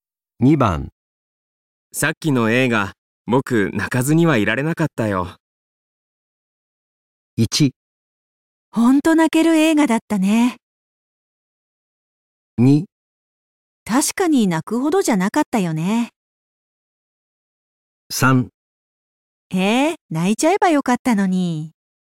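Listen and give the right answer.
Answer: 1: ほんと泣ける映画だったね。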